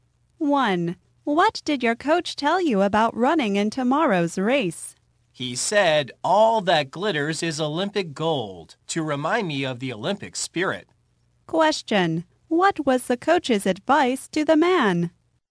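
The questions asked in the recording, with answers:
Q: What was the coach's advice to the man?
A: To remember the Olympic spirit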